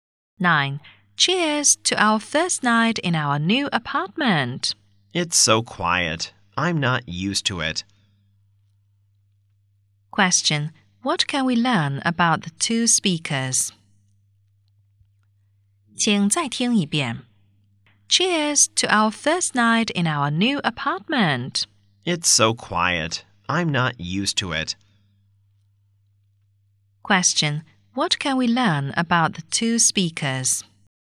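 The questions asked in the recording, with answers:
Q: what can we learn about the two speakers?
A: They have just moved into a new apartment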